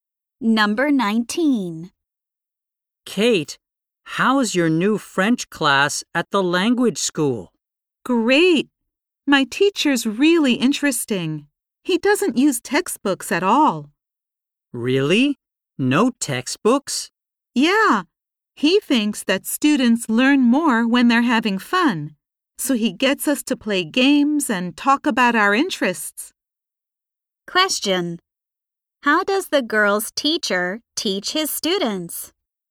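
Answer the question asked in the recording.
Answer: He has them play games and talk about their interests, without textbooks.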